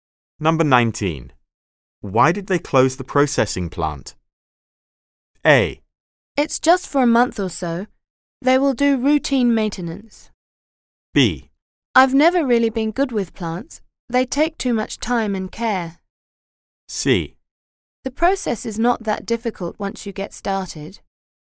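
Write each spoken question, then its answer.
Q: Why did they close the processing plant?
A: A: It's just for a month or so. They will do routine maintenance.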